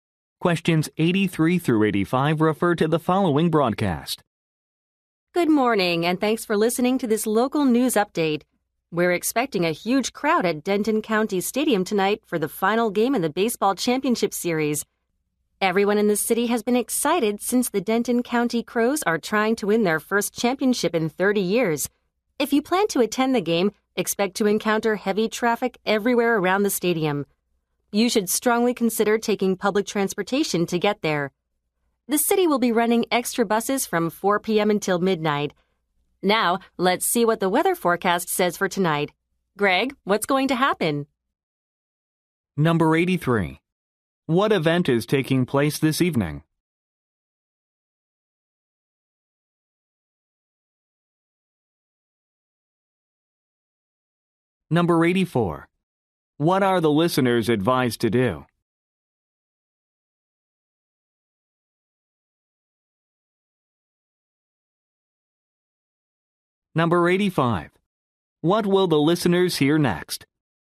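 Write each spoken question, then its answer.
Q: What event is taking place this evening?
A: The final game of the baseball championship series

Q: What are the listeners advised to do?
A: Take public transportation

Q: What will the listeners hear next?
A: The weather forecast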